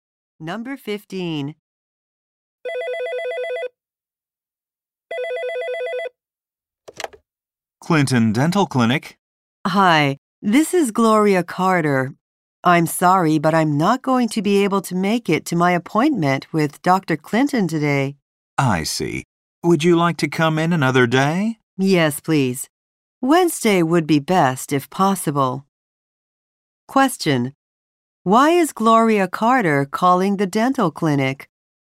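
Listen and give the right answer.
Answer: To change her appointment to another day.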